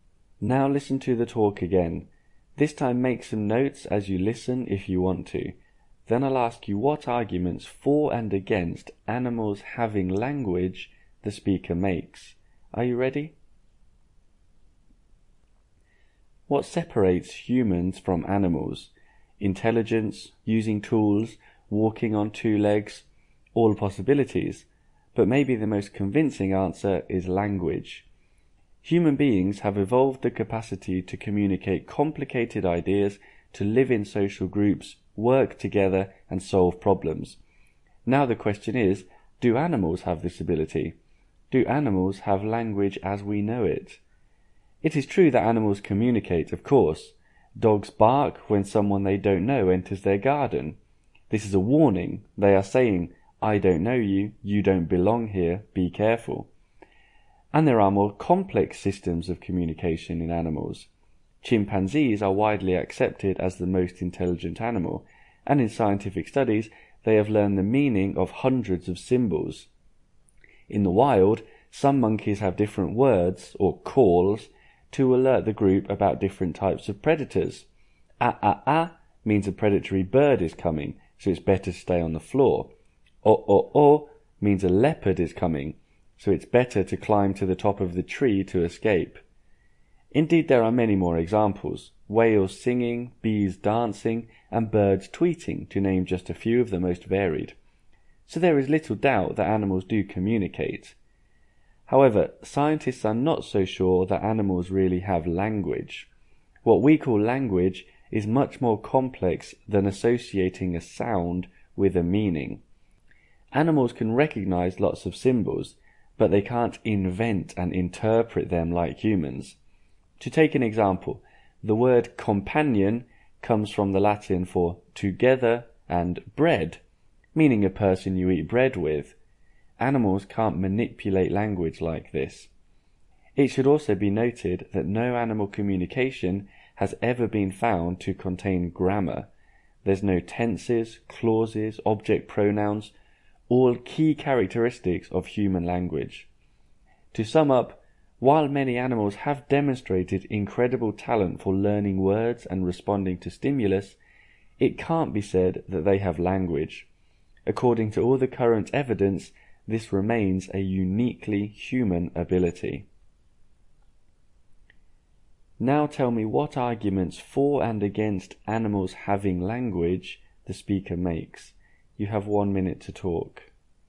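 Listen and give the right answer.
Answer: For: dogs bark warnings, chimpanzees learn hundreds of symbols, monkeys use different calls for different predators, and whales, bees and birds communicate. Against: animals can't invent or interpret symbols like humans, and their communication has no grammar.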